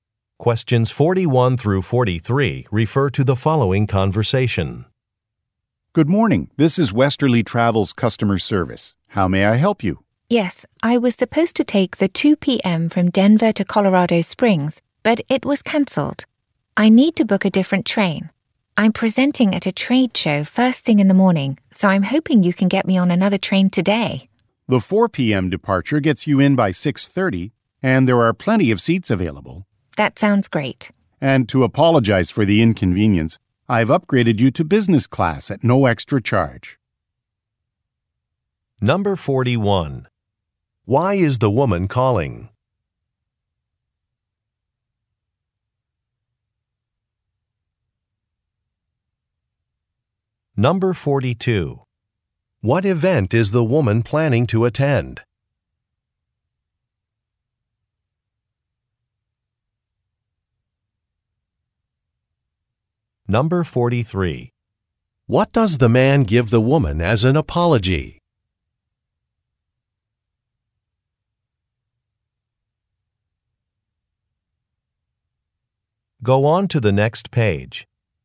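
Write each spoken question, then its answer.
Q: Why is the woman calling?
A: Her train was cancelled and she needs to book another

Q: What event is the woman planning to attend?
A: A trade show

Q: What does the man give the woman as an apology?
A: A free upgrade to business class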